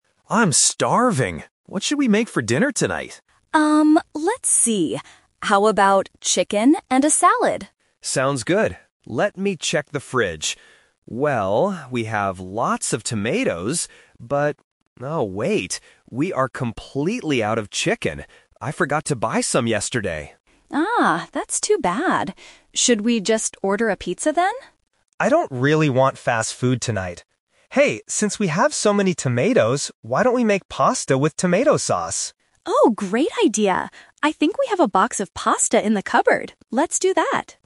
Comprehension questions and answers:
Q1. What are they going to have for dinner?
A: Pasta with tomato sauce

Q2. What ingredient is missing from the fridge?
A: Chicken

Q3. Why doesn't Mark want to order a pizza?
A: He doesn't want fast food tonight.

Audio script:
Mark: I'm starving. What should we make for dinner tonight?
Sarah: Um, let's see. How about chicken and a salad?
Mark: Sounds good. Let me check the fridge. Well, we have lots of tomatoes, but... oh wait. We are completely out of chicken. I forgot to buy some yesterday.
Sarah: Ah, that's too bad. Should we just order a pizza then?
Mark: I don't really want fast food tonight. Hey, since we have so many tomatoes, why don't we make pasta with tomato sauce?